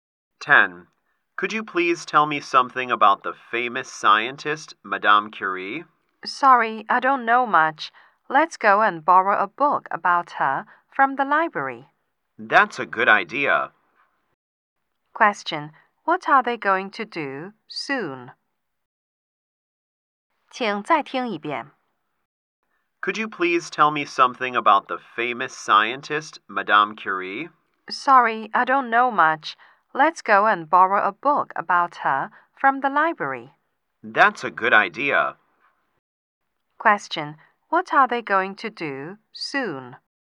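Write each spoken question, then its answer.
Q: What are they going to do soon?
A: Borrow a book about Madame Curie from the library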